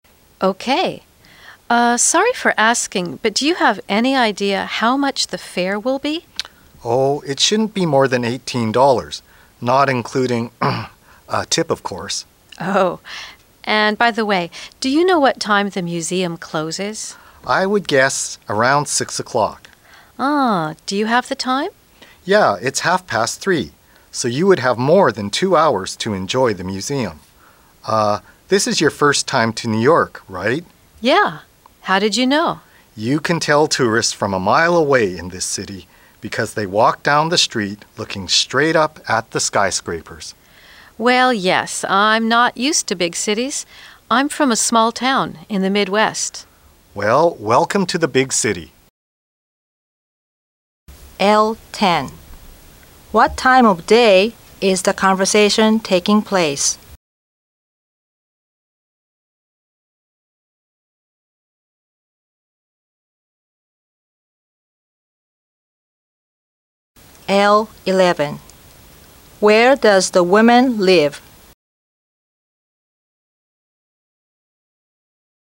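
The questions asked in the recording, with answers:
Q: What time of day is the conversation taking place?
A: Afternoon (3:30)

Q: Where does the woman live?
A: In a small town in the Midwest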